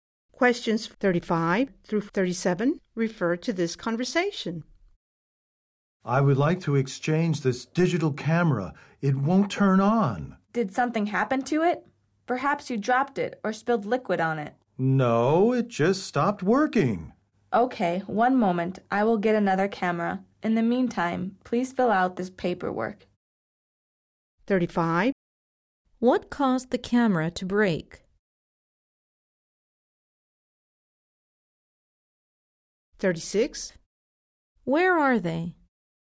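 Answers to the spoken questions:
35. Nothing; it just stopped working
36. In a store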